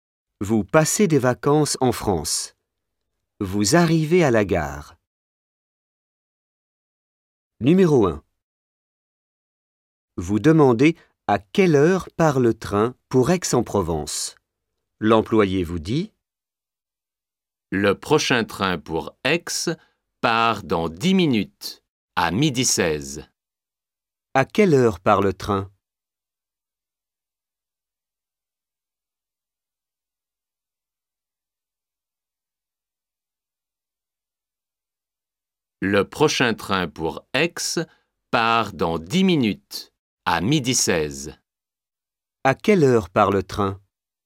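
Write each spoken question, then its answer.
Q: À quelle heure part le train?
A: À 12h16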